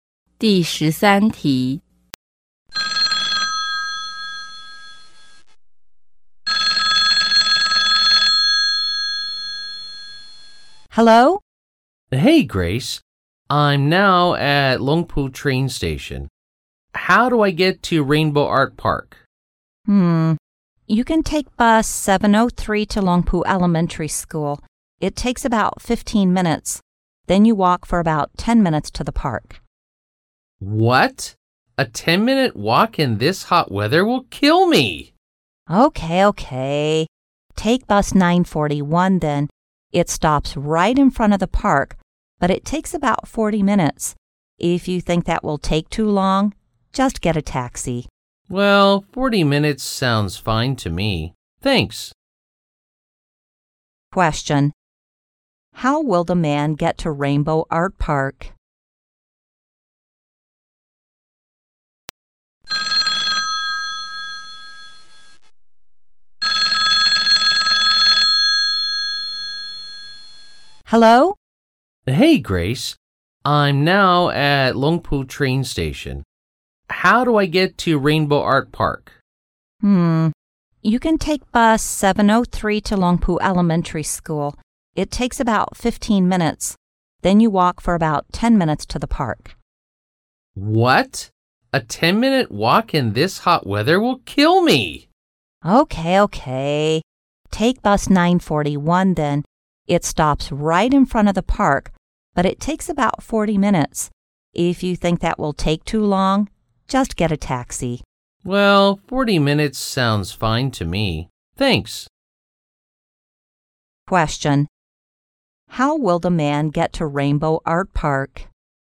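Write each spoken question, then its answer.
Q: How will the man get to Rainbow Art Park?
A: By bus 941.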